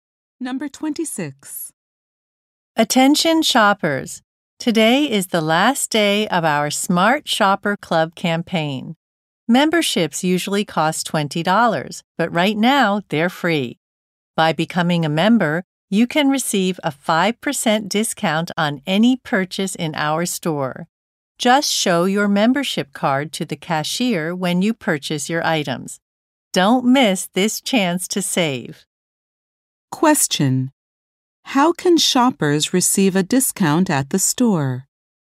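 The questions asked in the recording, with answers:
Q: Question: How can shoppers receive a discount at the store?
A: By showing a membership card to the cashier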